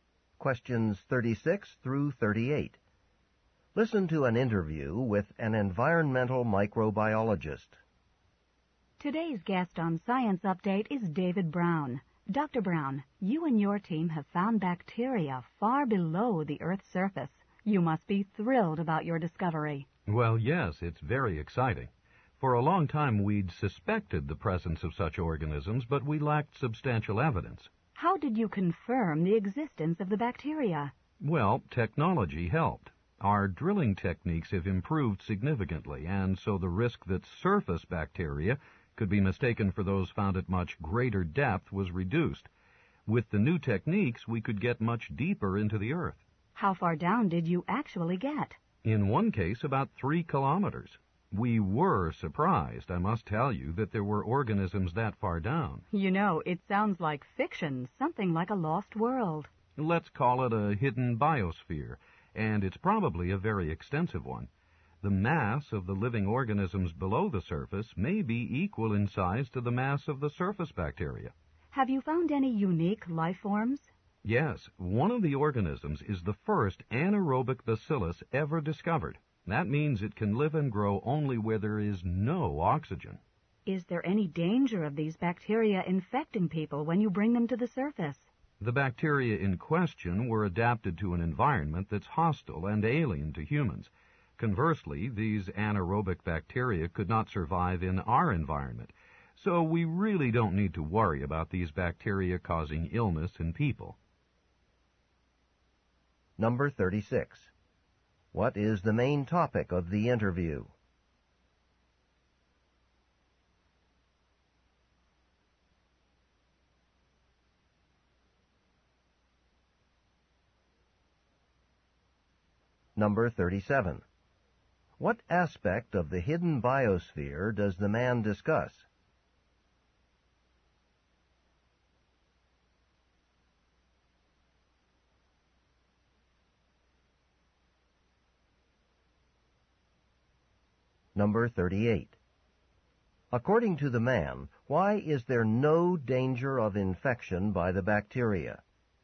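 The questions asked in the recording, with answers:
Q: What is the main topic of the interview?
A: The discovery of bacteria deep below the Earth's surface.

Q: According to the man, why is there no danger of infection by the bacteria?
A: The bacteria can't survive in an environment with oxygen.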